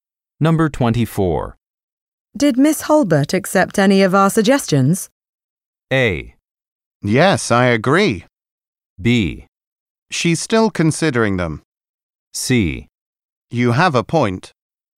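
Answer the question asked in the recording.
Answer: B: She's still considering them.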